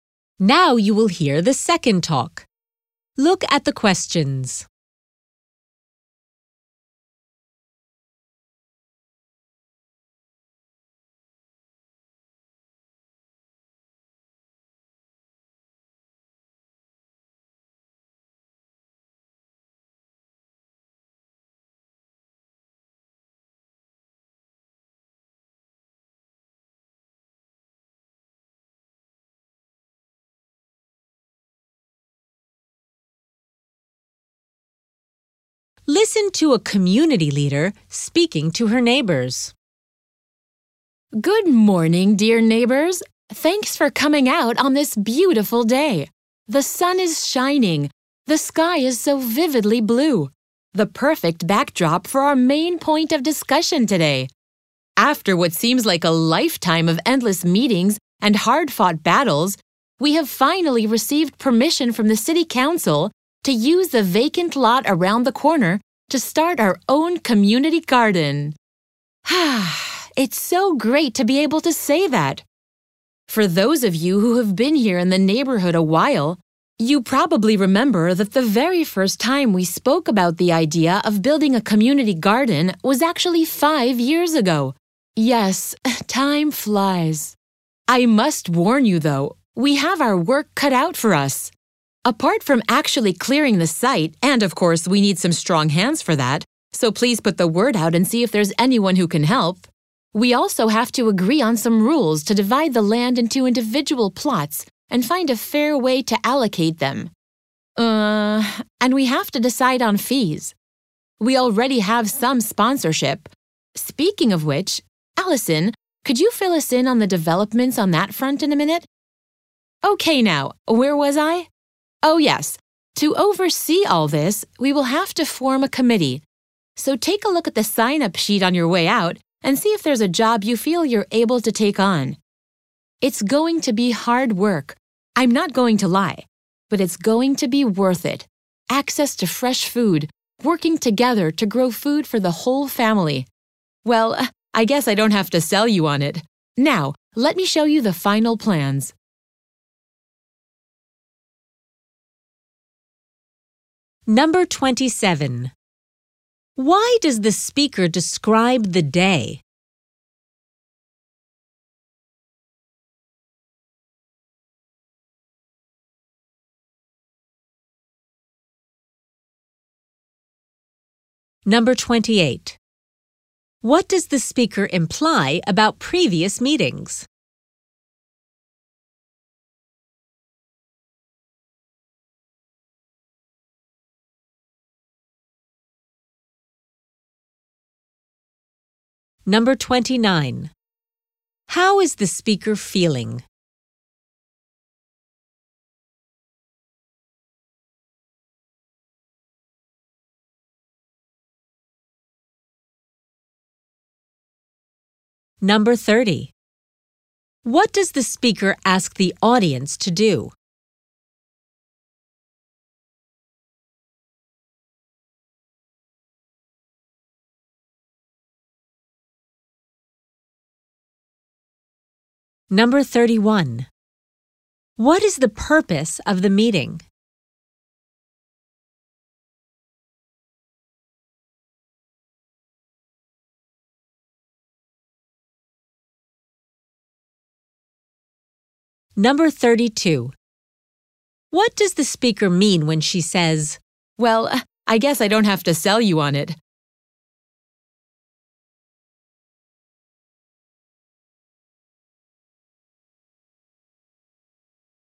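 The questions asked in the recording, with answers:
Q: What does the speaker imply about previous meetings?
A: They were long and difficult

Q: How is the speaker feeling?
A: Happy and excited

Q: What is the purpose of the meeting?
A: To announce permission for the community garden and plan the work

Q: What does the speaker mean when she says, "Well, I guess I don't have to sell you on it"?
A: The audience already knows the benefits of the garden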